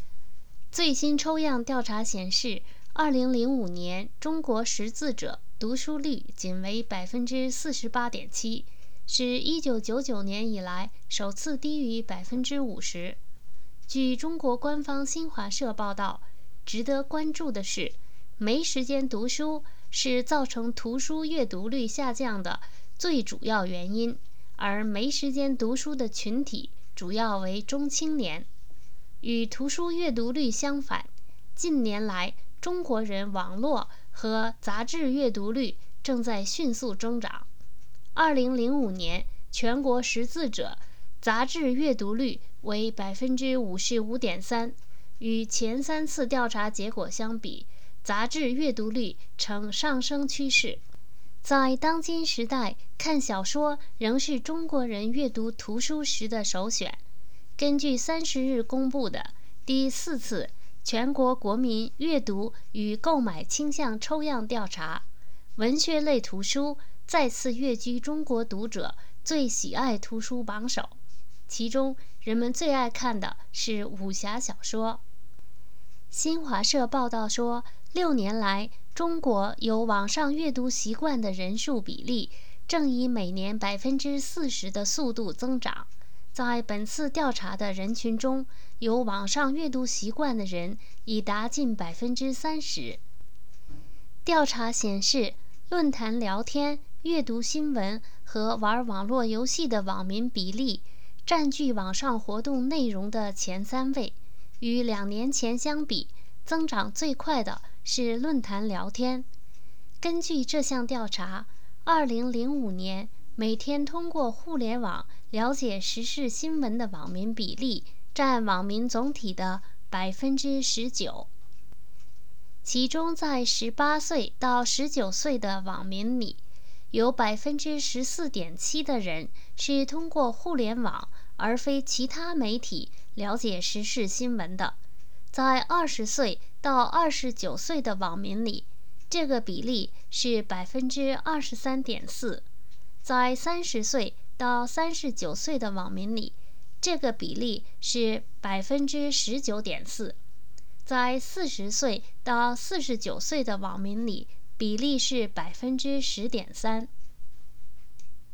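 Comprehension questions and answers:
Please answer the following questions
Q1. 2005年中国识字者的读书率是多少?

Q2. 造成图书阅读率下降的最主要原因是什么?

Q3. 在文学类图书中最受人们喜爱的是什么书?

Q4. 根据调查显示,中国网民主要的网上活动是什么?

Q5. 在2005年,有多少中国网民是通过上网了解时事新闻的?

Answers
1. 48.7%
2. 没时间读书
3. 武侠小说
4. 论坛聊天、阅读新闻和玩网络游戏
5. 19%

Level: 3rd Year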